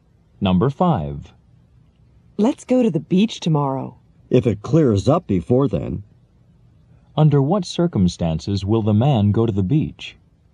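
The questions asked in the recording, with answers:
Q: Under what circumstances will the man go to the beach?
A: If the weather clears up.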